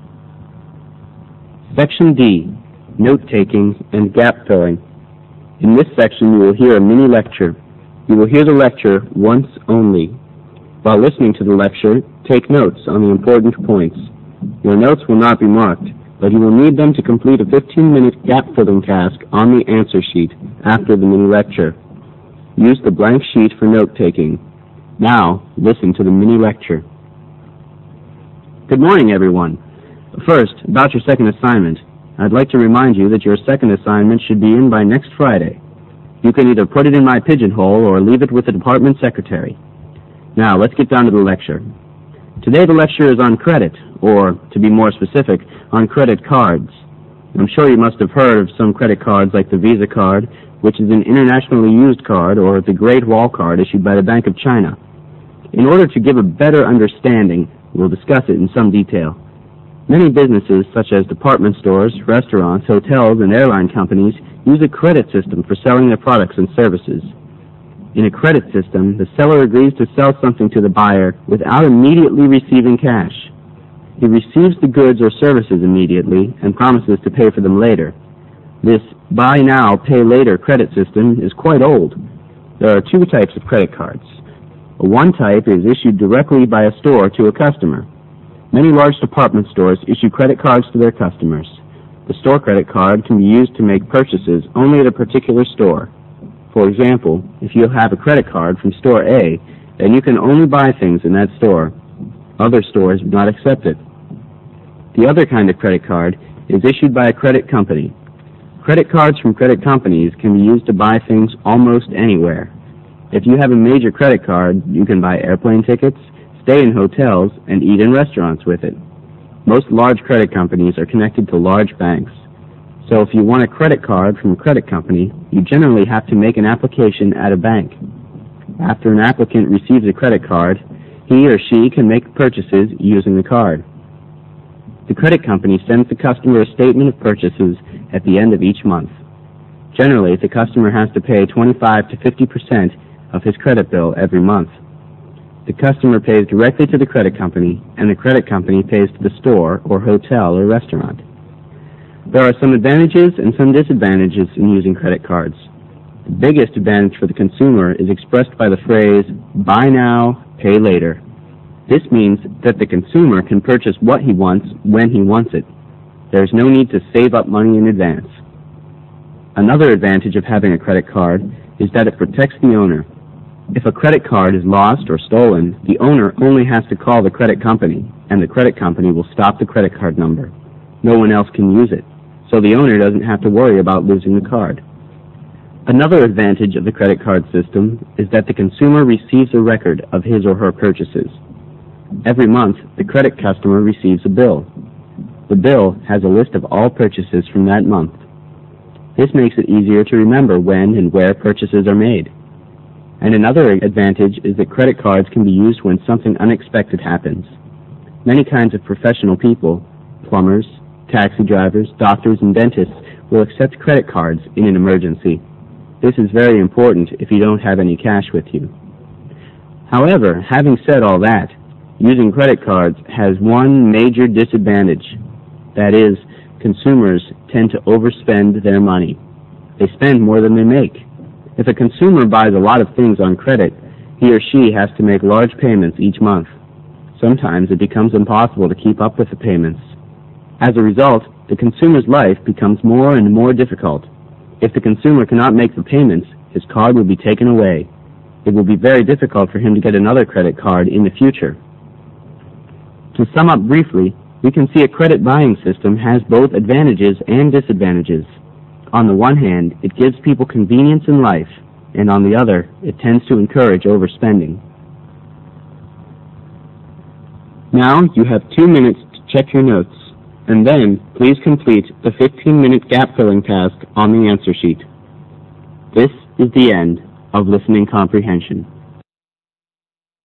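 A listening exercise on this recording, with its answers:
In this section you will hear a mini-lecture ONCE ONLY. While listening to the lecture, take notes on the important points. Your notes will not be marked, but you will need them to complete a 15-minute gap-filling task on ANSWER SHEET ONE after the mini-lecture. Use the blank paper for note-taking. Fill in each of the gaps with one word. You may refer to your notes. Make sure the word you fill in is both grammatically and semantically acceptable.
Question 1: They fall into two categories: one has (1)______ use, while the other is accepted almost everywhere.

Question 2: The application for the use of the latter one must be made at a (2) ______.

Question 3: Once the customer starts using the card, he will be provided with a monthly statement of (3)______ by the credit company.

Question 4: He is required to pay one quarter to half of his credit (4)______ every month.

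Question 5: With a card, it is not (5)______ to save up money before an actual purchase.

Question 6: A (6)______ and complete list of purchase received from the credit company helps the owner to remember the time and (7)______ of his purchase.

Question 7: A (6)______ and complete list of purchase received from the credit company helps the owner to remember the time and (7)______ of his purchase.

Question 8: the cards axe accepted in a (n) (8)______ by professional people like dentists, etc.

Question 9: The card owner is tempted to (9)______ his money.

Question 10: If this is the case, it will become increasingly difficult for the user to keep up with the required (10)______, which will result in the credit card being cancelled by the credit company.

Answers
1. limited
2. bank
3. purchases
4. bill
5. necessary
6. monthly
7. place
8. emergency
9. overspend
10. payments

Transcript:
SECTION D NOTE-TAKING AND GAP-FILLING
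Good morning everyone. First about your second assignment. I'd like to remind you that your second assignment should be handed in by next Friday, You can either put it in my pigeon hole or leave it with the department secretary. Now, let's get down to the lecture.
Today the lecture is on credit or, to be more specific, on credit cards. I'm sure you must have heard of some credit cards like the Visa card, which is an internationally used card or the Great Wall card issued by the Bank of China.
In order to give a better understanding we'll discuss it in sonic detail. Many businesses, such as department stores, restaurants, hotels and airline companies use a credit system for selling their products and services. In a credit system the seller agrees to sell something to the buyer without immediately receiving cash. He receives the goods or services immediately and promises to pay for them later. 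This buy-now-pay-later credit system is quite old. There are two types of credit cards. One type is issued directly by a store to a customer. Many large department stores issue credit cards to their customers. The store credit card can be used to make purchases only at a particular store. For example, if you have a credit card from Store A, then you can only buy things in that store. Other stores would not accept it.
The other kind of credit cards is issued by a credit company. Credit cards from credit companies can be used to buy things almost anywhere. If you have a major credit card, you can buy air plane tickets, stay in hotels and eat in restaurants with it. Most large credit companies are connected to large banks. So if you want a credit card from a credit company, you generally have to make an application at a bank. After an applicant receives a credit card, he or she can make purchases using the card. 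The credit company sends the customer a statement of purchases at the end of each month. Generally the Customer has to pay 25 to 50 percent of their (his) credit bill every month. The customer pays directly to the credit company and the credit company pays to the store or hotel or restaurant.
There are some advantages and some disadvantages to using credit cards. The biggest advantage for the consumer is expressed by the phrase "Buy now, pay later". This means that the consumer can purchase what he wants when he wants it. There is no need to save up money in advance. Another advantage of having a credit card is that it protects the owner, if a credit card is lost or stolen, the owner only has to call the credit company, and the credit company will stop the credit
card number, No one else can use it. So the owner doesn't have to worry about losing the card.
Another advantage of the credit card system is that the consumer receives a record of his or her purchases. 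Every month the credit customer receives a bill. The bill has a list of all purchases from that month. This makes it easier to remember when and where purchases are made. And another advantage is that credit cards can be used when something unexpected happens. Many kinds of professional people - plumbers, taxi drivers, doctors and dentists will accept credit cards in an emergency. This is very important if you don't have any cash with you.
However, having said all that, using credit cards has one major advantage, that is consumers tend to overspend their money. They spend more than they make. If a consumer buys a lot of things on credit, he or she has to make large payments each month. Sometimes it becomes impossible to keep up with the payments. As a result, the consumer's life becomes more and more difficult. If the consumer cannot make the payments, his card will be taken away. It will be very difficult for him to get another credit card in the future.
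To sum up briefly, we can see a credit buying system has both advantages and disadvantages. On the one hand it gives people convenience in life and on the other hand it tends to encourage overspending.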